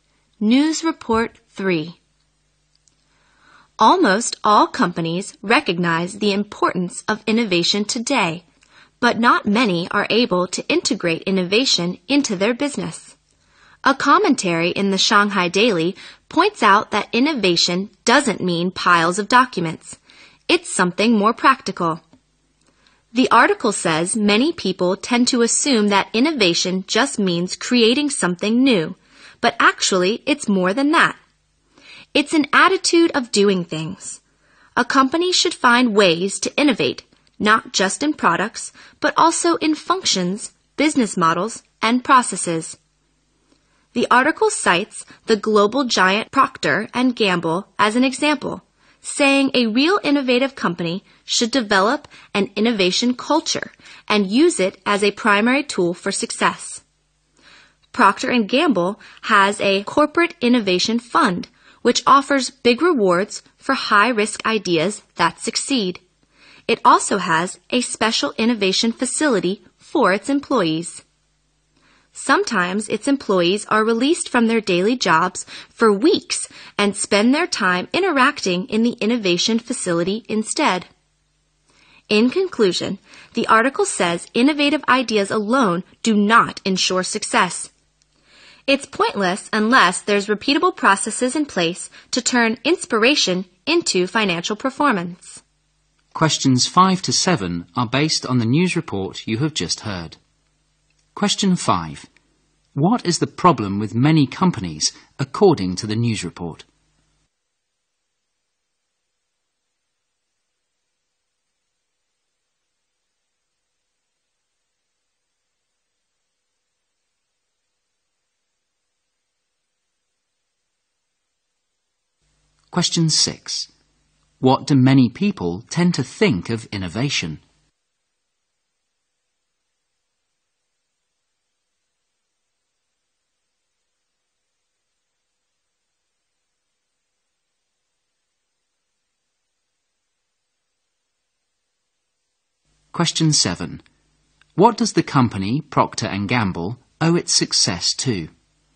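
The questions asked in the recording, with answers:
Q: What is the problem with many companies, according to the news report?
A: They are not able to integrate innovation into their business.

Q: What do many people tend to think of innovation?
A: That it just means creating something new.

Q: What does the company Procter & Gamble owe its success to?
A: Its innovation culture.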